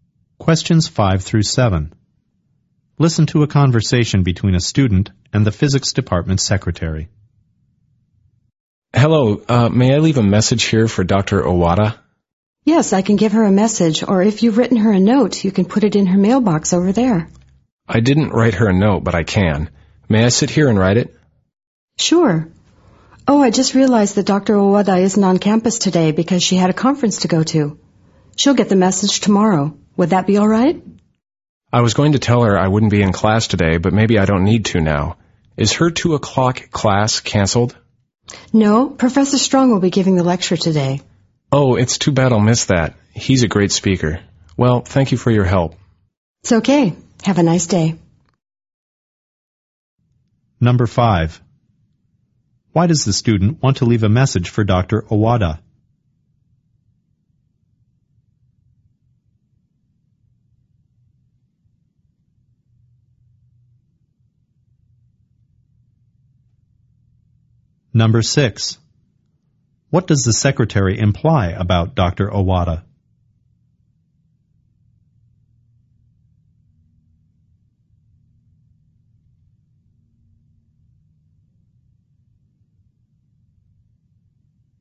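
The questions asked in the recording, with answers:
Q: Why does the student want to leave a message for Dr. Owada?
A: To tell her he won't be in class today.

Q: What does the secretary imply about Dr. Owada?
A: She is away at a conference and won't get the message until tomorrow.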